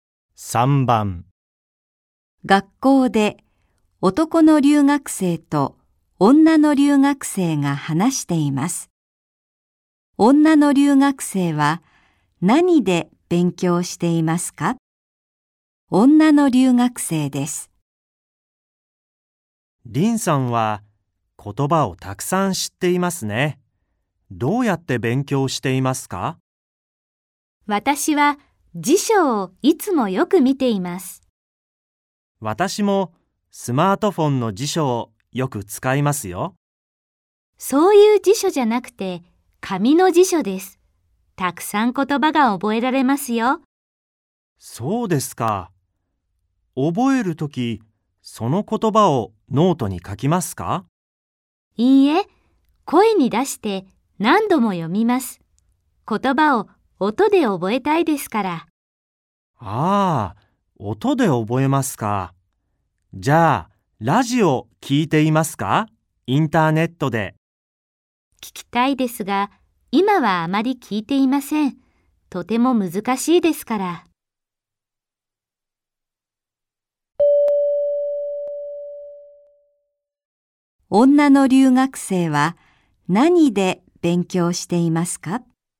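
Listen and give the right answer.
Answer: 紙の辞書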